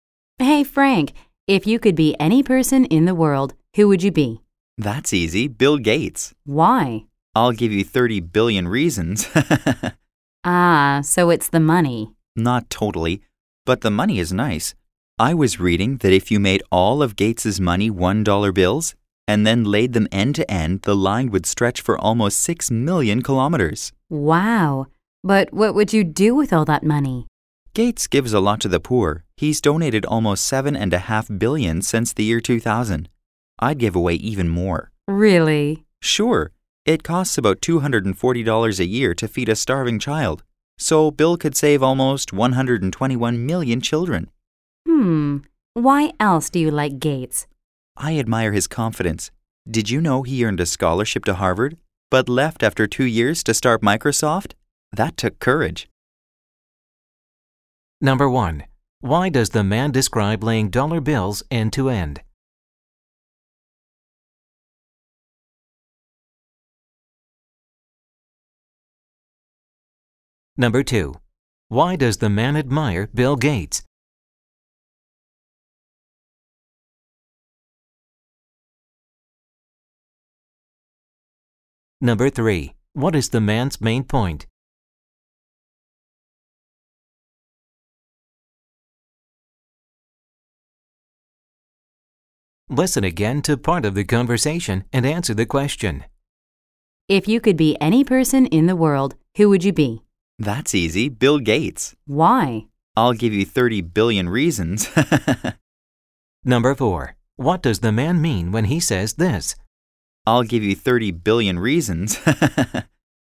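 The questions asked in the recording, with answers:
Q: Why does the man describe laying dollar bills end to end?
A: To show how much money Bill Gates has

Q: Why does the man admire Bill Gates?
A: For his confidence: he left Harvard to start Microsoft

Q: What does the man mean when he says this?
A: Gates's huge wealth is a main reason he would want to be him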